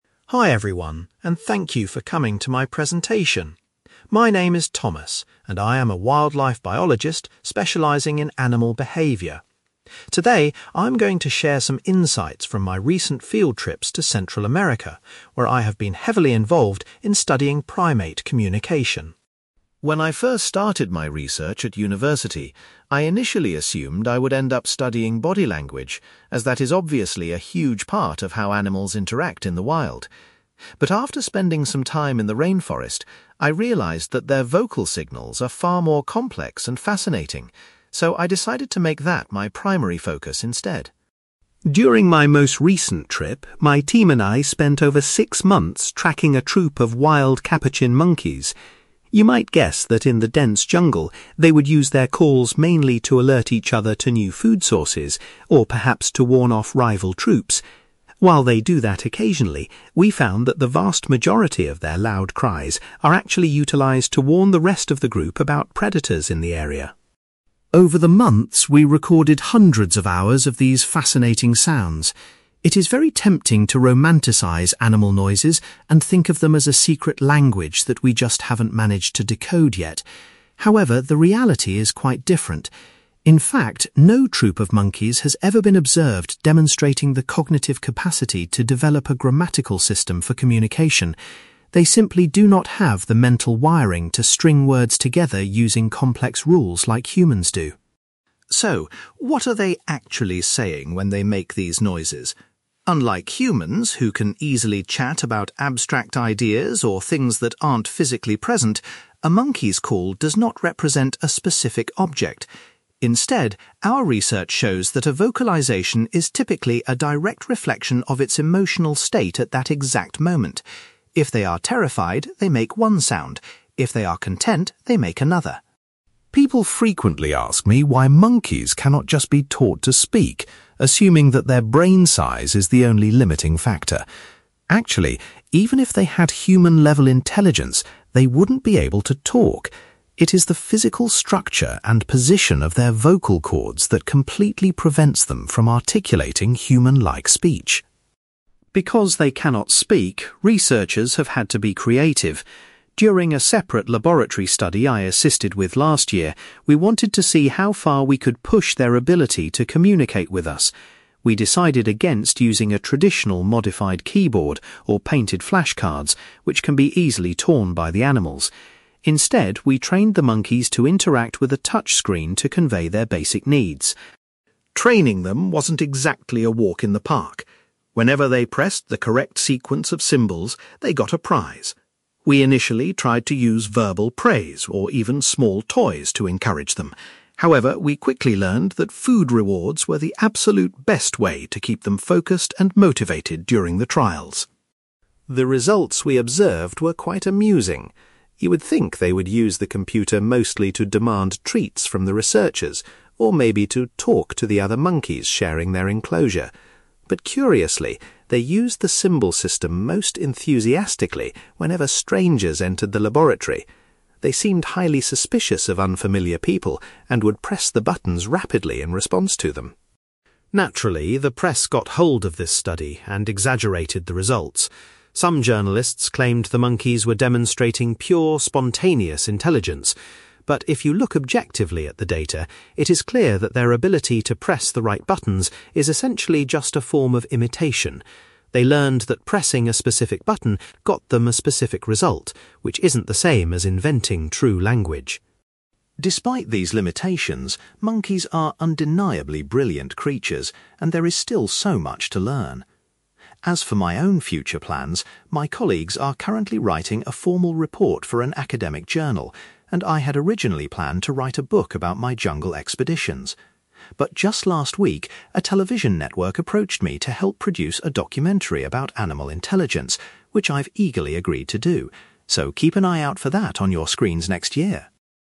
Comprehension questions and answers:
You will hear a wildlife biologist called Thomas giving a presentation about animal communication and his research on monkeys. For questions 9-18, complete the sentences with a word or short phrase.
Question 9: Thomas was originally going to study body language, but ultimately chose to investigate monkeys' (9)........................... .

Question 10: Thomas discovered that the wild monkeys mainly used their calls to warn their group about (10)........................... .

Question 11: Thomas explains that monkeys lack the intelligence to create a (11)........................... to communicate with each other.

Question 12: According to Thomas, a monkey's call is typically a direct reflection of its (12)........................... .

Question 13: Thomas points out that monkeys are physically unable to speak like humans due to the structure of their (13)........................... .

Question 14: In the laboratory experiments, the monkeys communicated their desires by using a (14)........................... .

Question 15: Thomas found that the most effective way to motivate the monkeys was by giving them (15)........................... .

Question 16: The monkeys used the symbol system most often when (16)........................... came into the laboratory.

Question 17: Thomas argues that the monkeys' ability to use symbols is actually just a form of (17)........................... .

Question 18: Thomas is looking forward to being involved in a (18)........................... about animal intelligence in the near future.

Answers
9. vocal signals
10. predators
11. grammatical system
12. emotional state
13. vocal cords
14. touchscreen
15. food rewards
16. strangers
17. imitation
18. documentary

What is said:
Thomas: Hi everyone, and thank you for coming to my presentation. My name is Thomas, and I am a wildlife biologist specialising in animal behaviour. Today, I am going to share some insights from my recent field trips to Central America, where I have been heavily involved in studying primate communication.
When I first started my research at university, I initially assumed I would end up studying body language, as that is obviously a huge part of how animals interact in the wild. But after spending some time in the rainforest, I realised that their vocal signals are far more complex and fascinating, so I decided to make that my primary focus instead.
During my most recent trip, my team and I spent over six months tracking a troop of wild capuchin monkeys. You might guess that in the dense jungle, they would use their calls mainly to alert each other to new food sources, or perhaps to warn off rival troops. While they do that occasionally, we found that the vast majority of their loud cries are actually utilised to warn the rest of the group about predators in the area.
Over the months, we recorded hundreds of hours of these fascinating sounds. It is very tempting to romanticise animal noises and think of them as a secret language that we just haven't managed to decode yet. However, the reality is quite different. In fact, no troop of monkeys has ever been observed demonstrating the cognitive capacity to develop a grammatical system for communication. They simply do not have the mental wiring to string words together using complex rules like humans do.
So, what are they actually saying when they make these noises? Unlike humans, who can easily chat about abstract ideas or things that aren't physically present, a monkey's call does not represent a specific object. Instead, our research shows that a vocalisation is typically a direct reflection of its emotional state at that exact moment. If they are terrified, they make one sound; if they are content, they make another.
People frequently ask me why monkeys cannot just be taught to speak, assuming that their brain size is the only limiting factor. Actually, even if they had human-level intelligence, they wouldn't be able to talk. It is the physical structure and position of their vocal cords that completely prevents them from articulating human-like speech.
Because they cannot speak, researchers have had to be creative. During a separate laboratory study I assisted with last year, we wanted to see how far we could push their ability to communicate with us. We decided against using a traditional modified keyboard, or painted flashcards, which can be easily torn by the animals. Instead, we trained the monkeys to interact with a touchscreen to convey their basic needs.
Training them wasn't exactly a walk in the park. Whenever they pressed the correct sequence of symbols, they got a prize. We initially tried to use verbal praise or even small toys to encourage them. However, we quickly learned that food rewards were the absolute best way to keep them focused and motivated during the trials.
The results we observed were quite amusing. You would think they would use the computer mostly to demand treats from the researchers, or maybe to 'talk' to the other monkeys sharing their enclosure. But curiously, they used the symbol system most enthusiastically whenever strangers entered the laboratory. They seemed highly suspicious of unfamiliar people and would press the buttons rapidly in response to them.
Naturally, the press got hold of this study and exaggerated the results. Some journalists claimed the monkeys were demonstrating pure, spontaneous intelligence. But if you look objectively at the data, it is clear that their ability to press the right buttons is essentially just a form of imitation. They learned that pressing a specific button got them a specific result, which isn't the same as inventing true language.
Despite these limitations, monkeys are undeniably brilliant creatures, and there is still so much to learn. As for my own future plans, my colleagues are currently writing a formal report for an academic journal, and I had originally planned to write a book about my jungle expeditions. But just last week, a television network approached me to help produce a documentary about animal intelligence, which I've eagerly agreed to do. So, keep an eye out for that on your screens next year!

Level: B2